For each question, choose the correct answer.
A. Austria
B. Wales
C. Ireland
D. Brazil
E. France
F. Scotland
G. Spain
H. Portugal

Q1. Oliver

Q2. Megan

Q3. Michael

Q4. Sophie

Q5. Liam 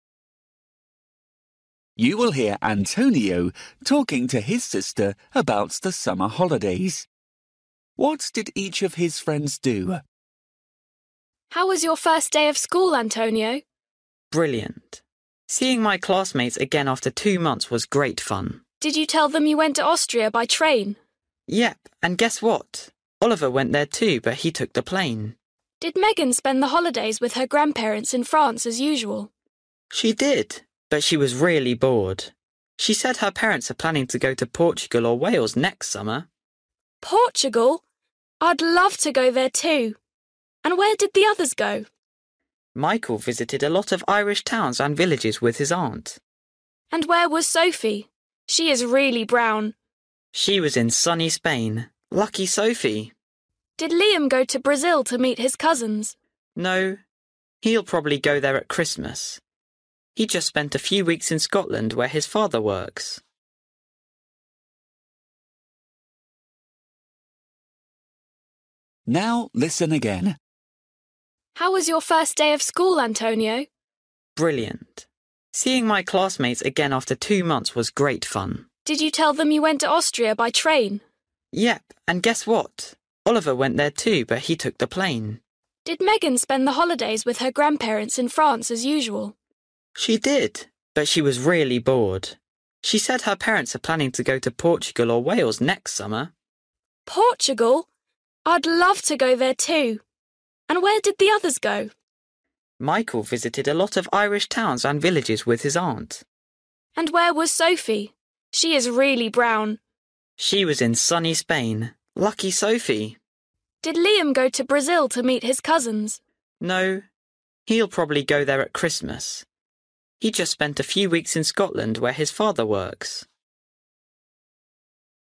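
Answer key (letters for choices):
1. A
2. E
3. C
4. G
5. F

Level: Luyện nghe trình độ A2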